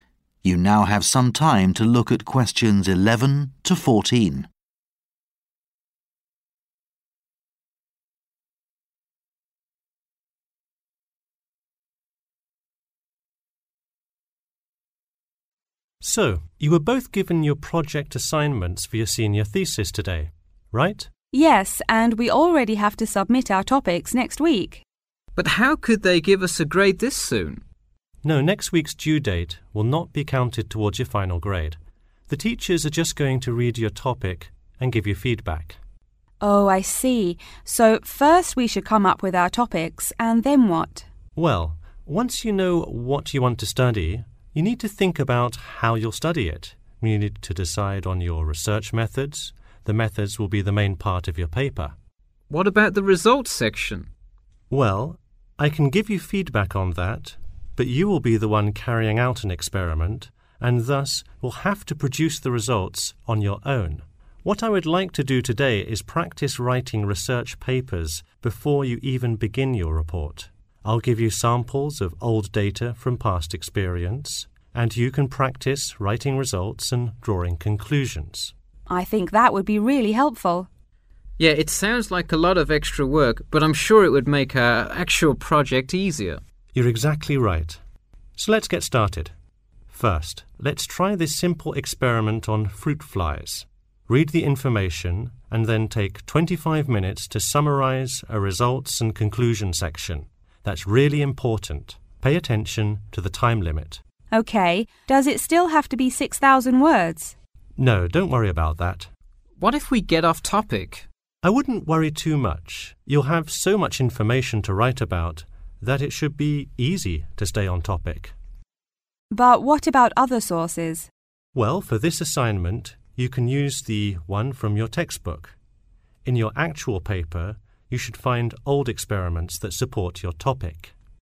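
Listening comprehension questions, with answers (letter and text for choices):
Choose the correct letter, A, B, or C.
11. The proposal will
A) be reviewed by two examiners.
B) be added to the final grade.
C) be returned with feedback.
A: C) be returned with feedback.

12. Who will be responsible for carrying out experiments and producing results?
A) The students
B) The tutor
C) The teachers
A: A) The students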